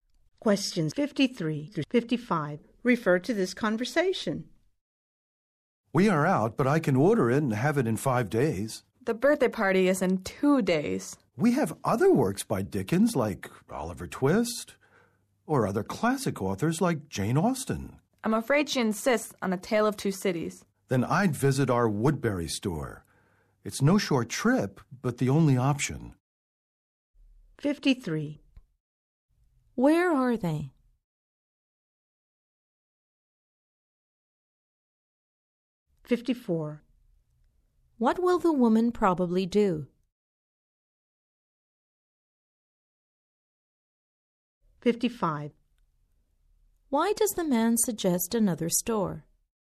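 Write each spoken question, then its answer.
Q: Where are they?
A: In a bookstore

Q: Why does the man suggest another store?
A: The book is out of stock and ordering would take 5 days, too late for the party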